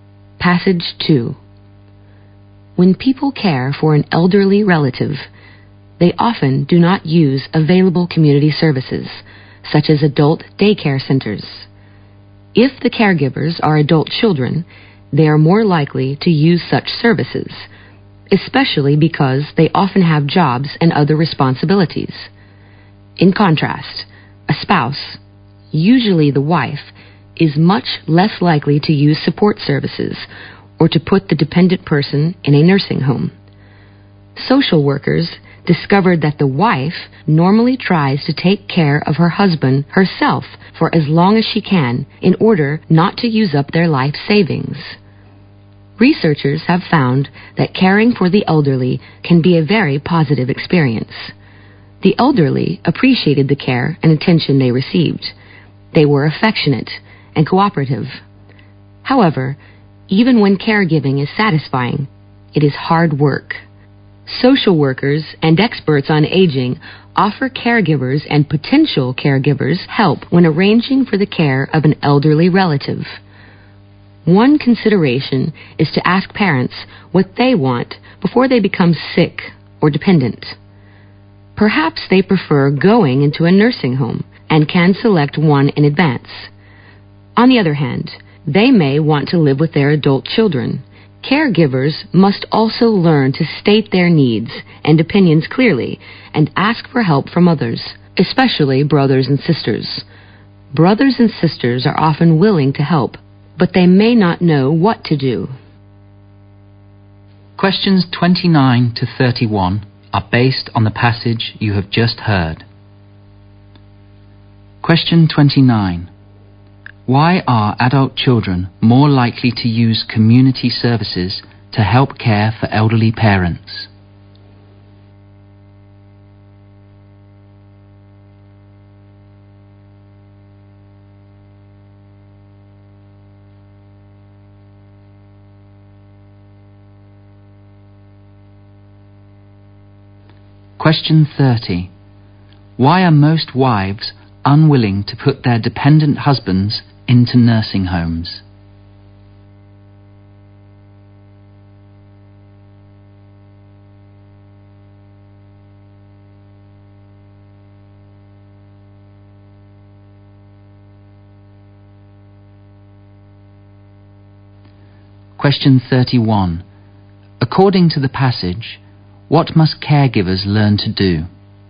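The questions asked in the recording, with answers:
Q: Why are adult children more likely to use community services to help care for elderly parents?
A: They have jobs and other responsibilities.

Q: Why are most wives unwilling to put their dependent husbands into nursing homes?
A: They don't want to use up their life savings.

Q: According to the passage, what must caregivers learn to do?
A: To state their needs and opinions clearly and ask others, especially siblings, for help.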